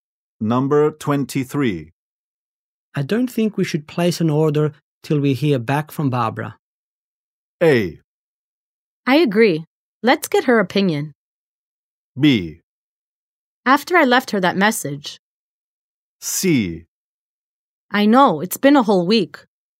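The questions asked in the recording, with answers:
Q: I don't think we should place an order till we hear back from Barbara.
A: A: I agree. Let's get her opinion.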